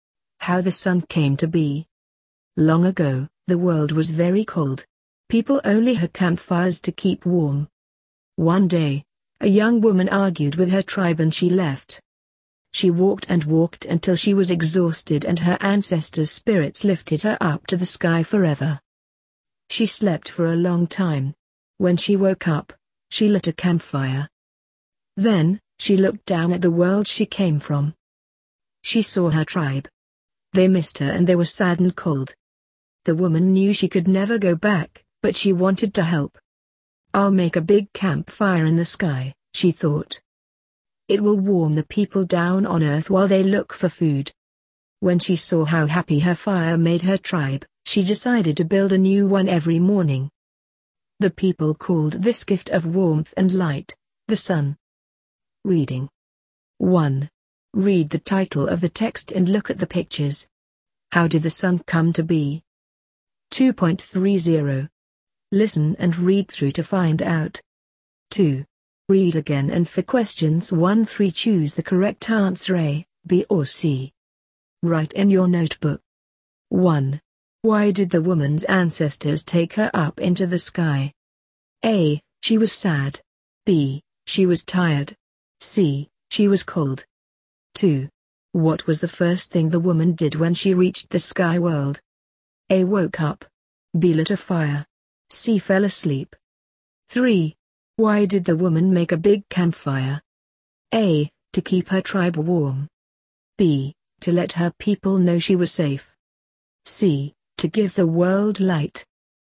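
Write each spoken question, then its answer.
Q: Why did the woman's ancestors take her up into the sky?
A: B: She was tired.

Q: What was the first thing the woman did when she reached the sky world?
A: C: Fell asleep.

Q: Why did the woman make a big campfire?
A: A: To keep her tribe warm.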